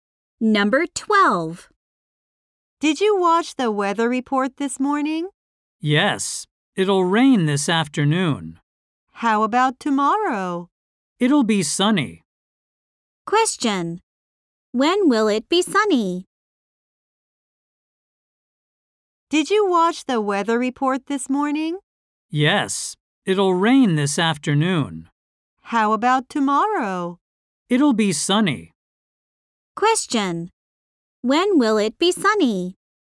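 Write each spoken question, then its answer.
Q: When will it be sunny?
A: Tomorrow.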